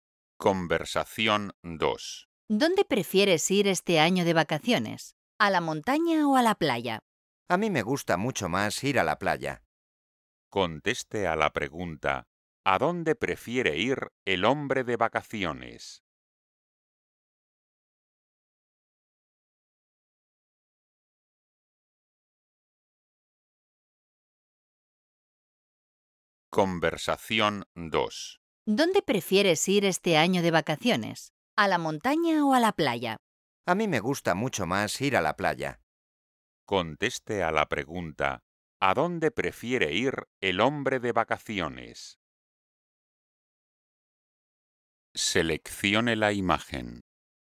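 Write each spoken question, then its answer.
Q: ¿a dónde prefiere ir el hombre de vacaciones?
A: a la playa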